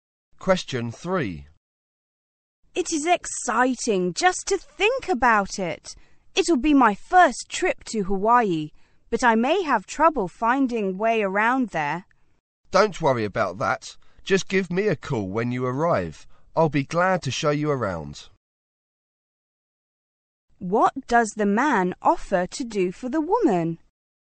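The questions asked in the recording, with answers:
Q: What does the man offer to do for the woman?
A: Show her around Hawaii.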